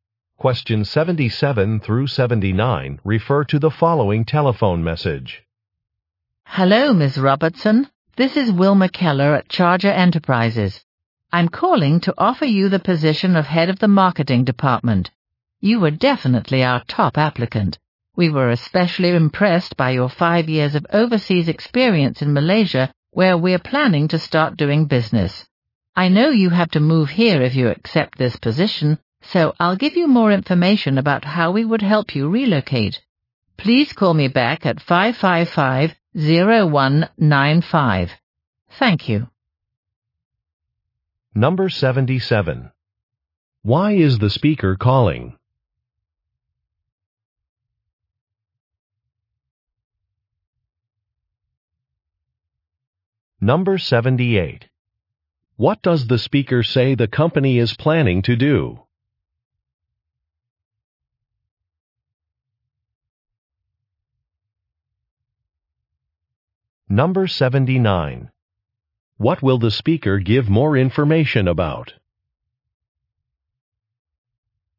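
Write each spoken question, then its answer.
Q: Why is the speaker calling?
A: To offer a job

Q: What does the speaker say the company is planning to do?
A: Start doing business in Malaysia

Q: What will the speaker give more information about?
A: Help with relocating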